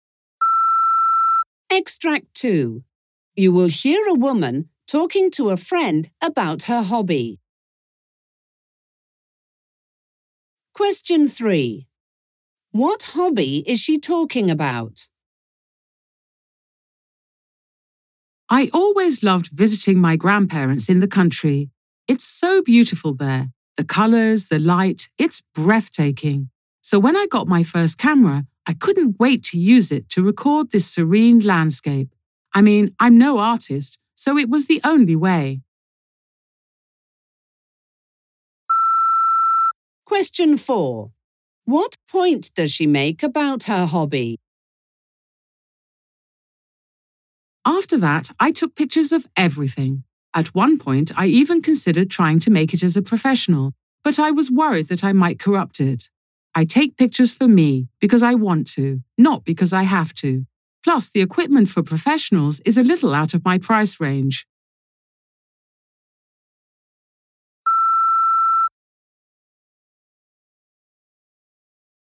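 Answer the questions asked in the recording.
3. Photography
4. She does it for herself and didn't want to turn it into a profession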